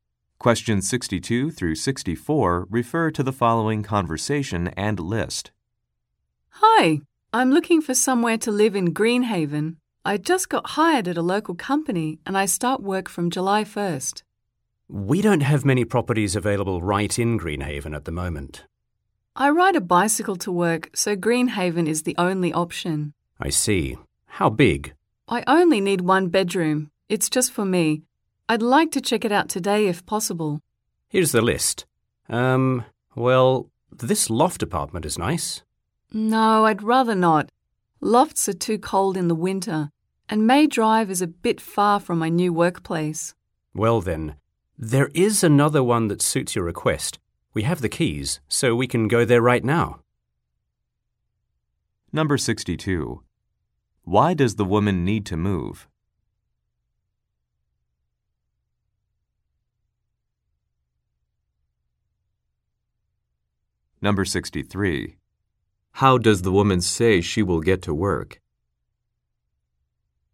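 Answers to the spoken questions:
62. She got a new job
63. By bicycle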